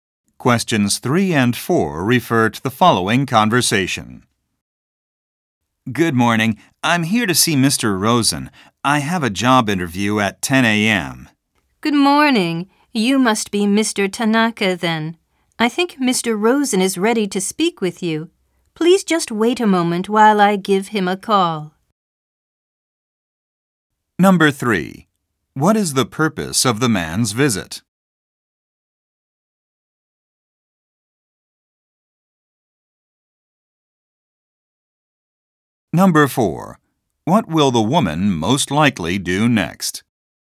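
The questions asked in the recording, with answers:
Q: What is the purpose of the man's visit?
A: To have a job interview

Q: What will the woman most likely do next?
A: Call Mr. Rosen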